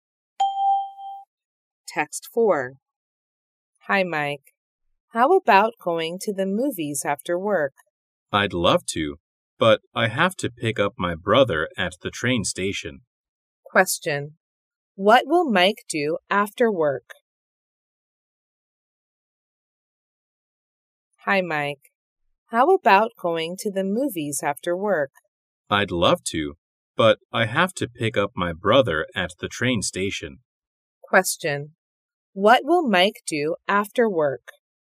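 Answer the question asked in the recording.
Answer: Pick up his brother at the train station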